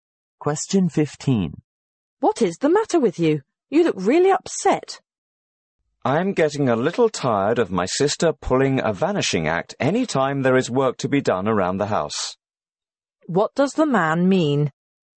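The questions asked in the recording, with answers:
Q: What does the man mean?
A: His sister always disappears when there is housework to do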